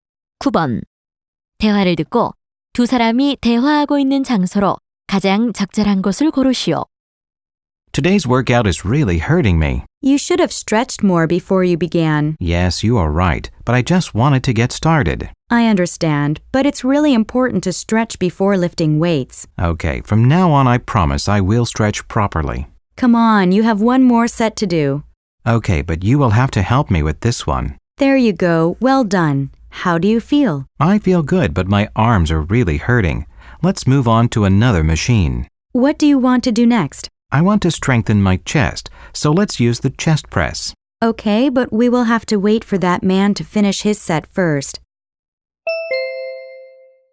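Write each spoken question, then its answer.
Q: 대화를 듣고 두 사람이 대화하고 있는 장소로 가장 적절한 곳을 고르시오.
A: 헬스장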